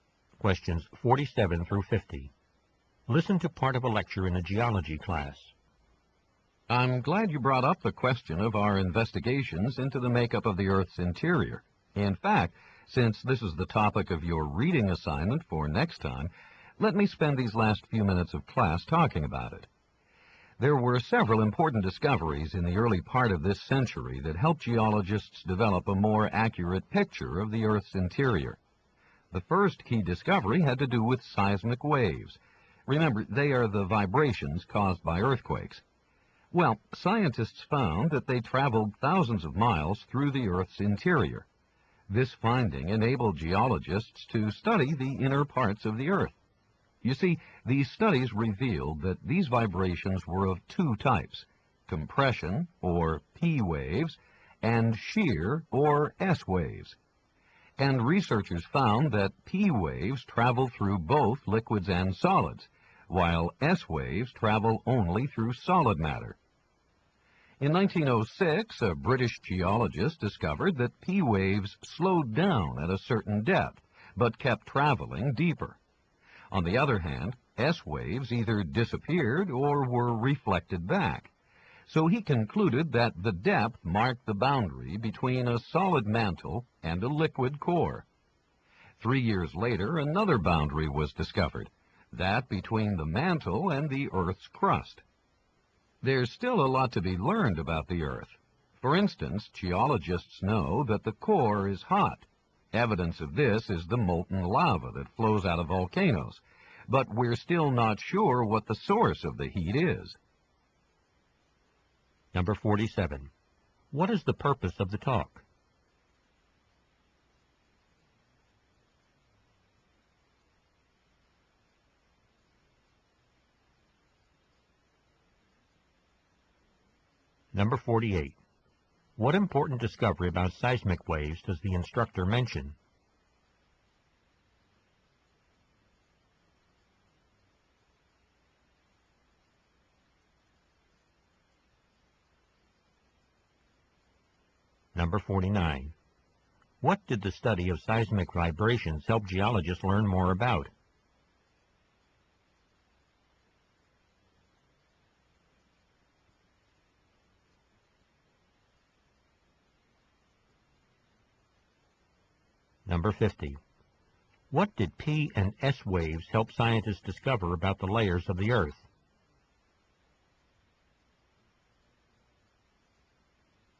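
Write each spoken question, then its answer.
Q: What is the purpose of the talk?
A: To introduce the reading topic: discoveries about the Earth's interior

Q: What important discovery about seismic waves does the instructor mention?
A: They travel thousands of miles through the Earth's interior

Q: What did the study of seismic vibrations help geologists learn more about?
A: The Earth's interior

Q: What did P and S waves help scientists discover about the layers of the Earth?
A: The boundary between the solid mantle and the liquid core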